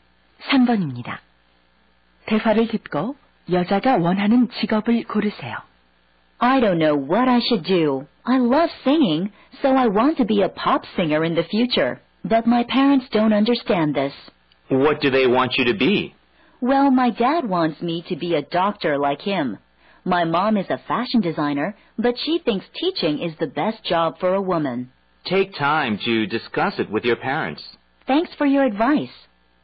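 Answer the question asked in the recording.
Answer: 가수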